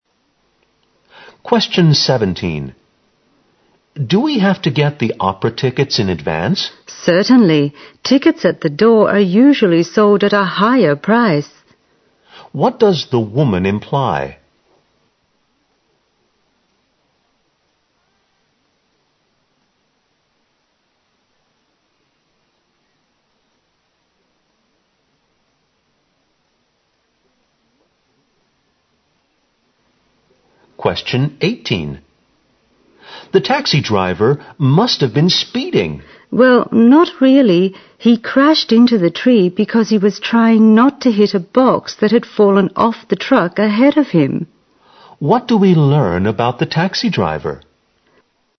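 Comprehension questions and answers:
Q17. What does the woman imply?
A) The tickets are more expensive than expected.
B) The tickets are sold in advance at half price.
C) It's difficult to buy the tickets on the spot.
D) It's better to buy the tickets beforehand.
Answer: D) It's better to buy the tickets beforehand.

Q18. What do we learn about the taxi driver?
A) He turned suddenly and ran into a tree.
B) He was hit by a fallen box from a truck.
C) He drove too fast and crashed into a truck.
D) He was trying to overtake the truck ahead of him.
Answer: A) He turned suddenly and ran into a tree.

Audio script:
M: Do we have to get the opera tickets in advance?
W: Certainly! Tickets at the door are usually sold at a higher price.
Q: What does the woman imply?
M: The taxi driver must have been speeding.
W: Well, not really! He crashed into the tree because he was trying not to hit a box that had fallen off the truck ahead of him.
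Q: What do we learn about the taxi driver?

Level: 大学英语四级

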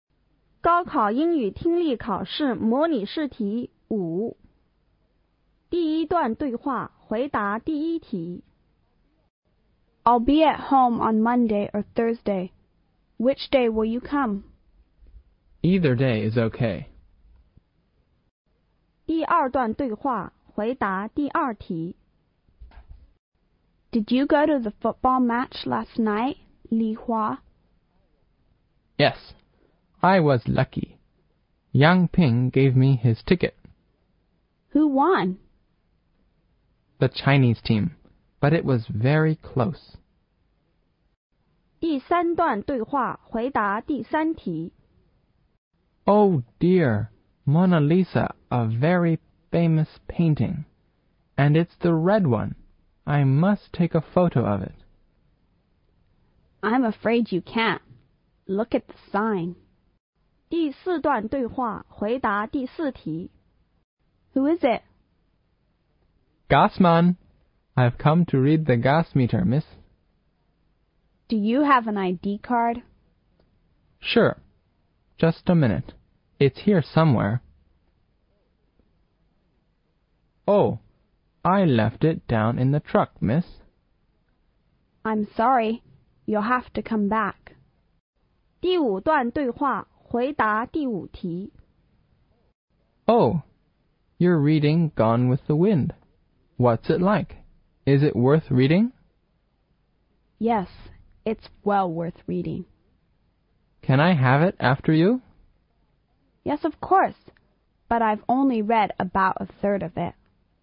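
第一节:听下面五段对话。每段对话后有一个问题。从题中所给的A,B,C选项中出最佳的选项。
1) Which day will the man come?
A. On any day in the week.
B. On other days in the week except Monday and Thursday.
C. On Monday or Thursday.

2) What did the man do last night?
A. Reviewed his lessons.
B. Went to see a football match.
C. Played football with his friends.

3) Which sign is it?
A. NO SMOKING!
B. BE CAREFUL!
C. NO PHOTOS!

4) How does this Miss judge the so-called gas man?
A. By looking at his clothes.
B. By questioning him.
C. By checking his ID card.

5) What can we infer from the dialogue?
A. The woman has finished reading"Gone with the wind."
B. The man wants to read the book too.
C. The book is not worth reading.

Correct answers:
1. C. On Monday or Thursday.
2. B. Went to see a football match.
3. C. NO PHOTOS!
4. C. By checking his ID card.
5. B. The man wants to read the book too.

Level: 高考

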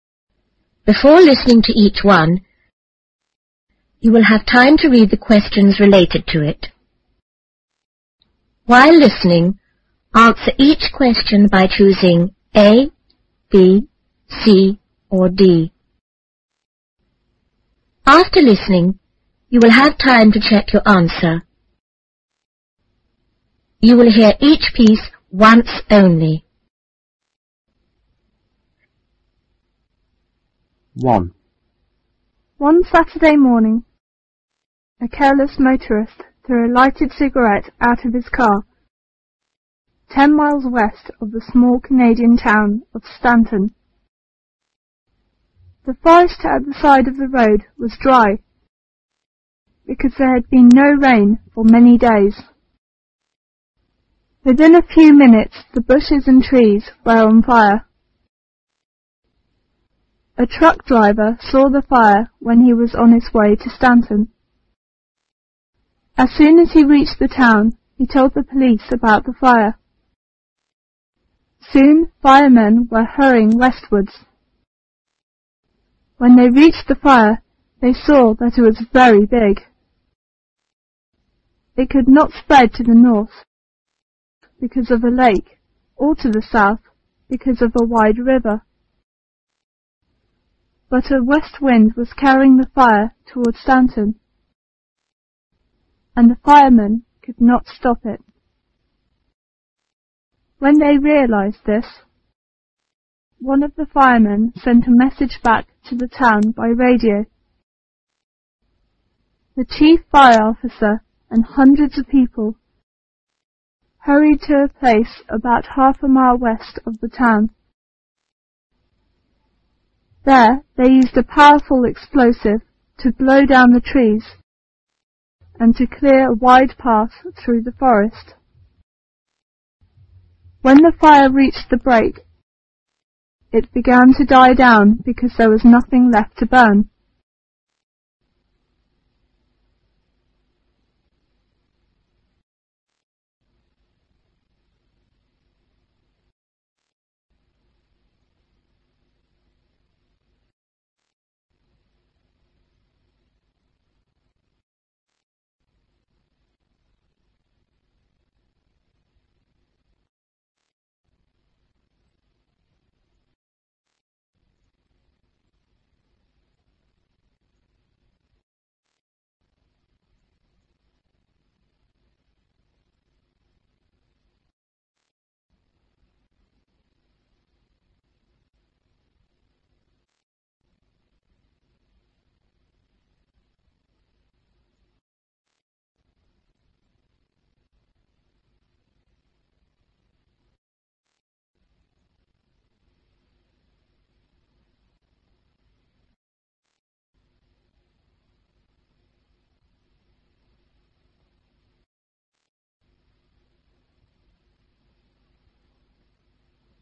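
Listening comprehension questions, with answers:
While listening,answer each question by choosing (A),(B),(C) or(D).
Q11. How did the fire start?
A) A motorist carelessly threw out a lighted cigarette.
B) A man passed the forest and lit it on purpose.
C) The bushes and trees were so dry that they burned by themselves.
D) No one knew the cause.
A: A) A motorist carelessly threw out a lighted cigarette.

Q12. Who warned the police about the fire?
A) A fireman.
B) A workman in the forest.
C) A car driver.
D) A truck driver.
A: D) A truck driver.

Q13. Why couldn't the fire spread to the south?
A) Because there was a lake there.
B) Because there was a river there.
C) Because there were a lot of fireman there.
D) Because there was a path there.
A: B) Because there was a river there.

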